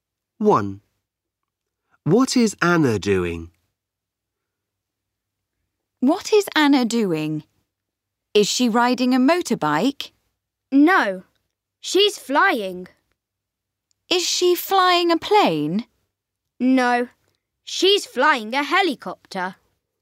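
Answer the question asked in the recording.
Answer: She's flying a helicopter.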